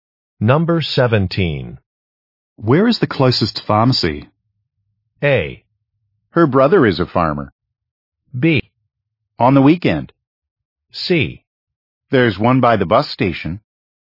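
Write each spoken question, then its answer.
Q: Where is the closest pharmacy?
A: C: There's one by the bus station.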